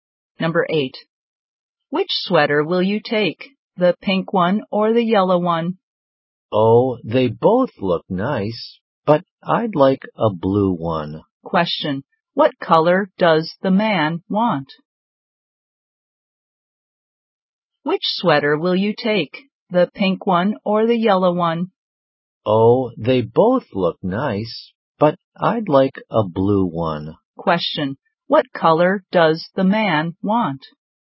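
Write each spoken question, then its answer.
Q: What color does the man want?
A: Blue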